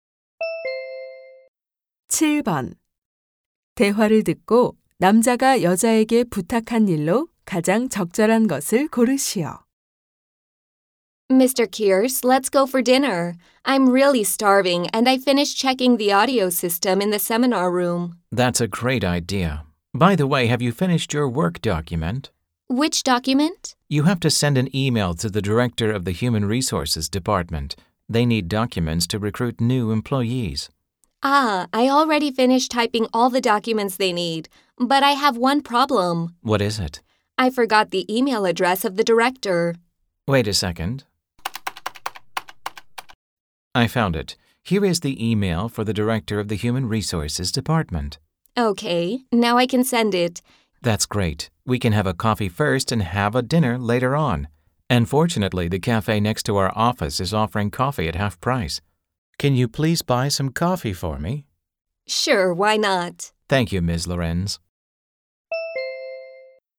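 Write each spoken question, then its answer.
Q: 대화를 듣고 남자가 여자에게 부탁한 일로 가장 적절한 것을 고르시오.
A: 커피 사다 주기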